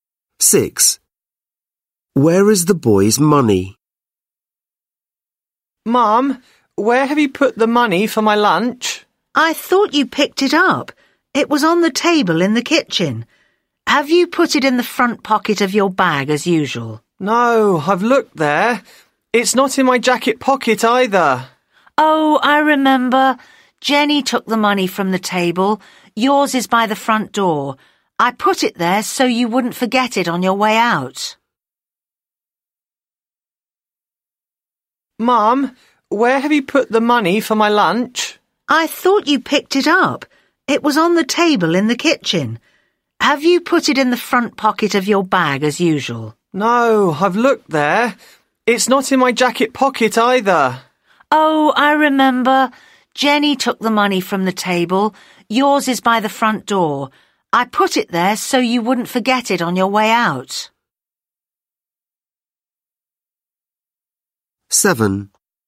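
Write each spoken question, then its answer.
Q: Where is the boy's money?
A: By the front door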